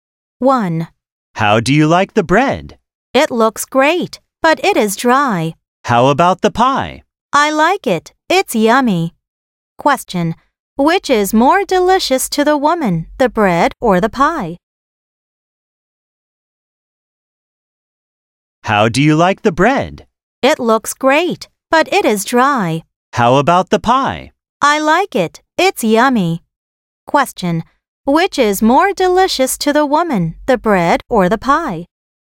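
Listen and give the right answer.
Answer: the pie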